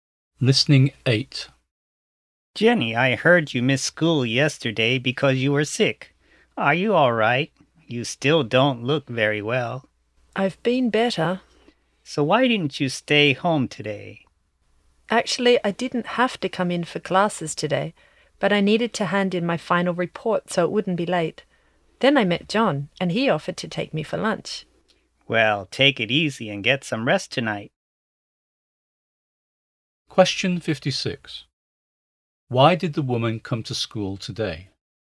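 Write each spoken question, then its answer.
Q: Why did the woman come to school today?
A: To hand in her final report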